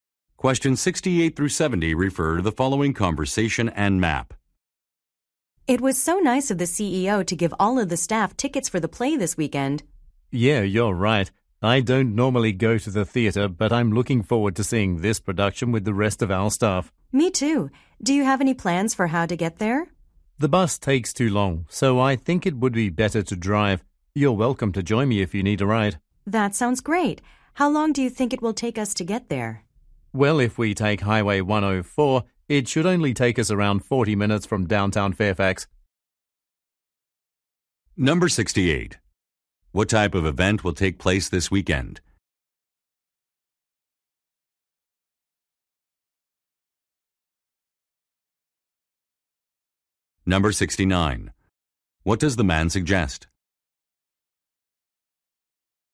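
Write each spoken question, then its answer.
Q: What type of event will take place this weekend?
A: A play

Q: What does the man suggest?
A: Driving there together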